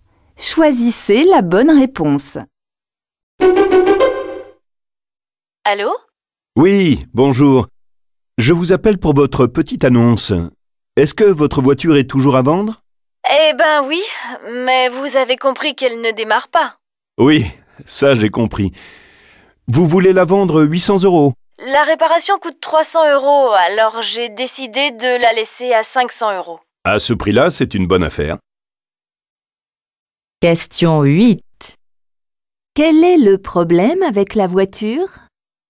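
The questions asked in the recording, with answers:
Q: Quel est le problème avec la voiture ?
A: Elle ne démarre pas.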